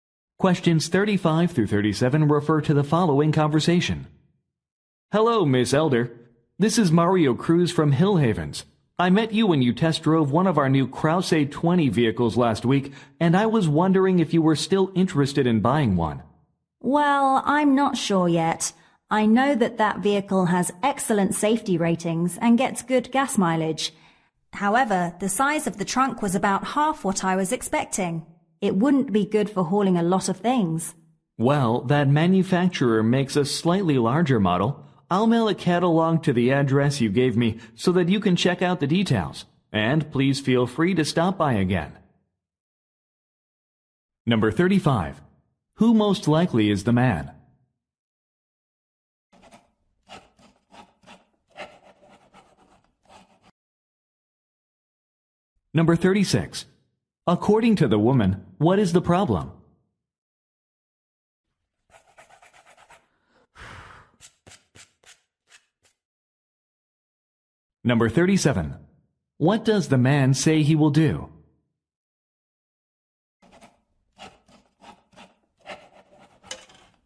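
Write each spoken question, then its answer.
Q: Who most likely is the man?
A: A car salesperson

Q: According to the woman, what is the problem?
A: The vehicle's trunk is too small

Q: What does the man say he will do?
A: Mail her a catalog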